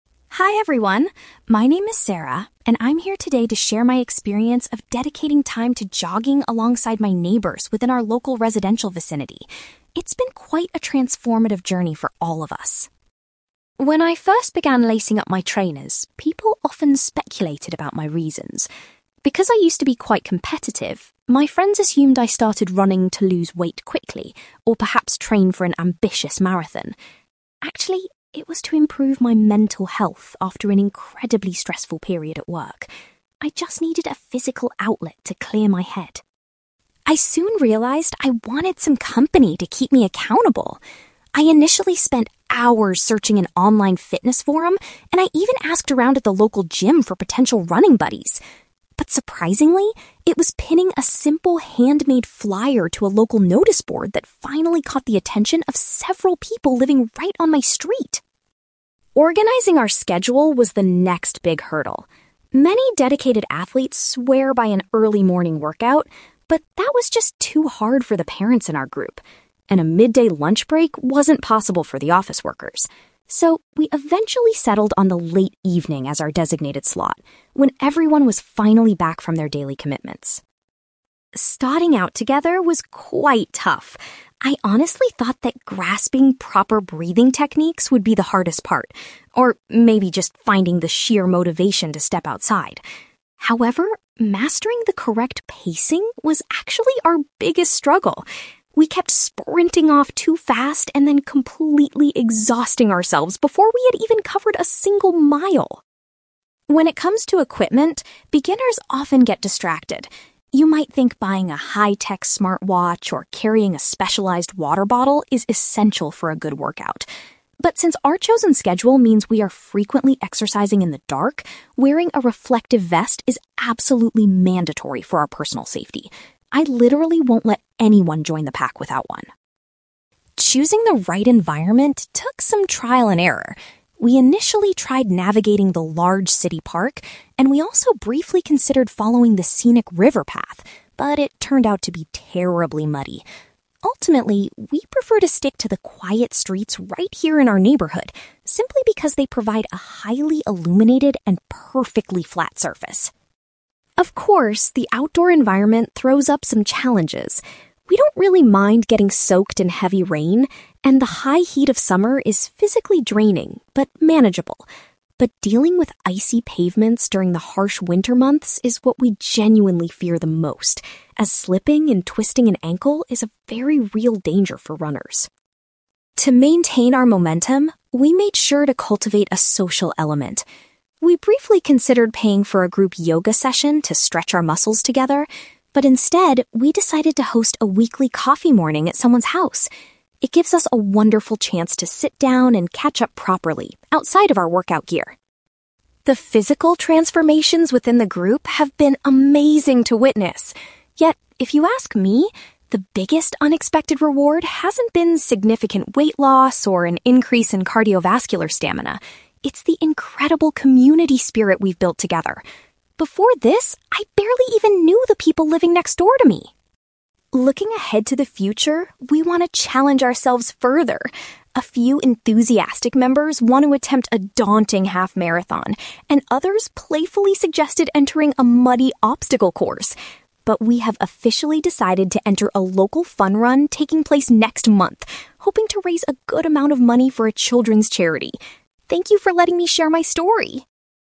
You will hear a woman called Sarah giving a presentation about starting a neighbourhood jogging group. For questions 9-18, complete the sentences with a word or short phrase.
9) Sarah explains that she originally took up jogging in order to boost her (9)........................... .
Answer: mental health

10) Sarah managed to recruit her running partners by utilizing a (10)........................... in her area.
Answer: notice board

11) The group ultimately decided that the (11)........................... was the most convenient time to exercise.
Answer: late evening

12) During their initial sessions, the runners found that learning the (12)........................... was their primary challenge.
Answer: correct pacing

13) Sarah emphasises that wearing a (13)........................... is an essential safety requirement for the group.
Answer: reflective vest

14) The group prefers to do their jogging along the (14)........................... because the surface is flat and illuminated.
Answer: quiet streets

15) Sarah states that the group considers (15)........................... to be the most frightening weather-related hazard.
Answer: icy pavements

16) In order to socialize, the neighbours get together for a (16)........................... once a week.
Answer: coffee morning

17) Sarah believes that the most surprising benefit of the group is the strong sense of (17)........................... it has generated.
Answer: community spirit

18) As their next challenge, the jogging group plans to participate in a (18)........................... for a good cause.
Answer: fun run

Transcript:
Sarah: Hi everyone. My name is Sarah, and I'm here today to share my experience of dedicating time to jogging alongside my neighbours within our local residential vicinity. It's been quite a transformative journey for all of us.
When I first began lacing up my trainers, people often speculated about my reasons. Because I used to be quite competitive, my friends assumed I started running to lose weight quickly or perhaps train for an ambitious marathon. Actually, it was to improve my mental health after an incredibly stressful period at work. I just needed a physical outlet to clear my head.
I soon realised I wanted some company to keep me accountable. I initially spent hours searching an online fitness forum, and I even asked around at the local gym for potential running buddies. But surprisingly, it was pinning a simple handmade flyer to a local notice board that finally caught the attention of several people living right on my street.
Organising our schedule was the next big hurdle. Many dedicated athletes swear by an early morning workout, but that was just too hard for the parents in our group, and a midday lunch break wasn't possible for the office workers. So, we eventually settled on the late evening as our designated slot, when everyone was finally back from their daily commitments.
Starting out together was quite tough. I honestly thought that grasping proper breathing techniques would be the hardest part, or maybe just finding the sheer motivation to step outside. However, mastering the correct pacing was actually our biggest struggle. We kept sprinting off too fast and then completely exhausting ourselves before we had even covered a single mile.
When it comes to equipment, beginners often get distracted. You might think buying a high-tech smartwatch or carrying a specialized water bottle is essential for a good workout. But since our chosen schedule means we are frequently exercising in the dark, wearing a reflective vest is absolutely mandatory for our personal safety. I literally won't let anyone join the pack without one.
Choosing the right environment took some trial and error. We initially tried navigating the large city park, and we also briefly considered following the scenic river path, but it turned out to be terribly muddy. Ultimately, we prefer to stick to the quiet streets right here in our neighbourhood, simply because they provide a highly illuminated and perfectly flat surface.
Of course, the outdoor environment throws up some challenges. We don't really mind getting soaked in heavy rain, and the high heat of summer is physically draining but manageable. But dealing with icy pavements during the harsh winter months is what we genuinely fear the most, as slipping and twisting an ankle is a very real danger for runners.
To maintain our momentum, we made sure to cultivate a social element. We briefly considered paying for a group yoga session to stretch our muscles together, but instead, we decided to host a weekly coffee morning at someone's house. It gives us a wonderful chance to sit down and catch up properly outside of our workout gear.
The physical transformations within the group have been amazing to witness. Yet, if you ask me, the biggest unexpected reward hasn't been significant weight loss or an increase in cardiovascular stamina. It's the incredible community spirit we've built together. Before this, I barely even knew the people living next door to me!
Looking ahead to the future, we want to challenge ourselves further. A few enthusiastic members want to attempt a daunting half-marathon, and others playfully suggested entering a muddy obstacle course. But we have officially decided to enter a local fun run taking place next month, hoping to raise a good amount of money for a children's charity. Thank you for letting me share my story!

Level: B2